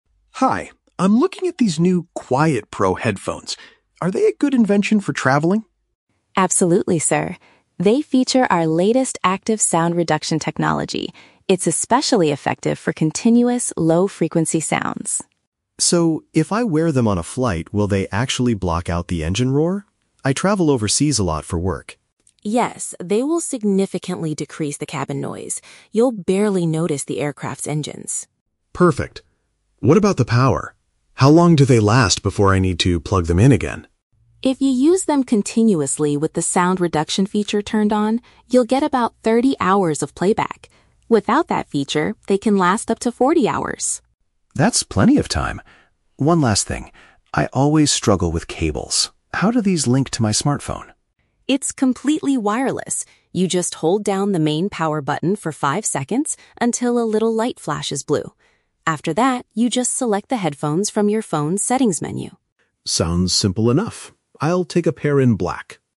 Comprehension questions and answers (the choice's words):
Listen to a conversation between a customer and a store clerk about a pair of headphones. For each question, choose the correct answer (A, B, or C).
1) How does the clerk describe the headphones' performance on an airplane?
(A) They will completely silence all conversations around the user.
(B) They will greatly reduce the loud sounds made by the aircraft.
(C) They are only effective during short domestic flights.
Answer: They will greatly reduce the loud sounds made by the aircraft.

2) How long will the device operate if the special sound reduction feature is active?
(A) Exactly five hours.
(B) Around thirty hours.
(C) Up to forty hours.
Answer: Around thirty hours.

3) What is the first step to connect the device to a mobile phone?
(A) Press and hold a switch until a colored light appears.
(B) Plug a wire directly into the bottom of the smartphone.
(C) Open the settings menu on the phone immediately.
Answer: Press and hold a switch until a colored light appears.

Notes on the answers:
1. Emma says the headphones will "significantly decrease the cabin noise" and the user will "barely notice the aircraft's engines." Option (B) is a direct paraphrase of this. Option (A) is a trap; the headphones reduce engine noise, but the audio never claims they silence all conversations. Option (C) is a trap; David mentions traveling "overseas" (long flights), not short domestic ones.
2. Emma clearly states, "with the sound reduction feature turned on, you'll get about thirty hours of playback." Option (C) is a trap; 40 hours is the battery life without the special feature turned on. Option (A) is a trap; "five" is mentioned in the audio, but it refers to the seconds needed to press the button, not the battery life.
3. Emma instructs David to "hold down the main power button for five seconds until a little light flashes blue." Option (A) uses synonyms ("switch" for "button", "colored light" for "light flashes blue"). Option (B) is a trap; the device is "completely wireless," and David says he struggles with cables (wires). Option (C) is a trap; opening the settings menu is the second step, not the first.

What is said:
David: Hi, I'm looking at these new "QuietPro" headphones. Are they a good invention for traveling?
Emma: Absolutely, sir. They feature our latest active sound reduction technology. It's especially effective for continuous, low-frequency sounds.
David: So, if I wear them on a flight, will they actually block out the engine roar? I travel overseas a lot for work.
Emma: Yes, they will significantly decrease the cabin noise. You'll barely notice the aircraft's engines.
David: Perfect. What about the power? How long do they last before I need to plug them in again?
Emma: If you use them continuously with the sound reduction feature turned on, you'll get about thirty hours of playback. Without that feature, they can last up to forty hours.
David: That's plenty of time. One last thing, I always struggle with cables. How do these link to my smartphone?
Emma: It's completely wireless. You just hold down the main power button for five seconds until a little light flashes blue. After that, you just select the headphones from your phone's settings menu.